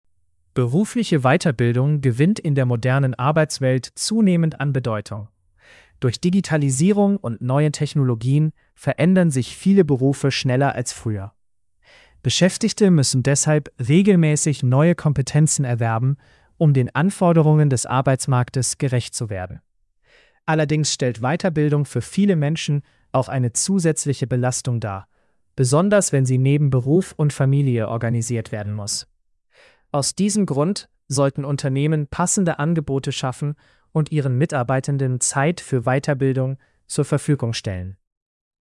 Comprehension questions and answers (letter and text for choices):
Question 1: Warum gewinnt Weiterbildung laut Text an Bedeutung?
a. Weil Menschen weniger arbeiten möchten.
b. Weil sich viele Berufe schnell verändern.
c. Weil Unternehmen keine Mitarbeitenden mehr brauchen.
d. Weil Weiterbildung immer kostenlos ist.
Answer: b. Weil sich viele Berufe schnell verändern.

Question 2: Welches Problem wird genannt?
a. Weiterbildung ist immer zu einfach.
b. Weiterbildung kann eine zusätzliche Belastung sein.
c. Weiterbildung ist nur für Schülerinnen und Schüler wichtig.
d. Weiterbildung ersetzt Berufserfahrung vollständig.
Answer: b. Weiterbildung kann eine zusätzliche Belastung sein.

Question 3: Was sollten Unternehmen laut Text tun?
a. Weiterbildung verbieten.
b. Passende Angebote schaffen und Zeit zur Verfügung stellen.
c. Nur junge Menschen einstellen.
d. Alle Kurse auf Englisch anbieten.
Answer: b. Passende Angebote schaffen und Zeit zur Verfügung stellen.

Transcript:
Berufliche Weiterbildung gewinnt in der modernen Arbeitswelt zunehmend an Bedeutung. Durch Digitalisierung und neue Technologien verändern sich viele Berufe schneller als früher. Beschäftigte müssen deshalb regelmäßig neue Kompetenzen erwerben, um den Anforderungen des Arbeitsmarktes gerecht zu werden. Allerdings stellt Weiterbildung für viele Menschen auch eine zusätzliche Belastung dar, besonders wenn sie neben Beruf und Familie organisiert werden muss. Aus diesem Grund sollten Unternehmen passende Angebote schaffen und ihren Mitarbeitenden Zeit für Weiterbildung zur Verfügung stellen.

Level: C1-Niveau